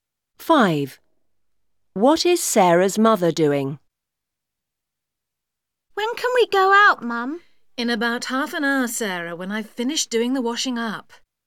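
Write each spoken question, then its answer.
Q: What is Sarah's mother doing?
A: The washing up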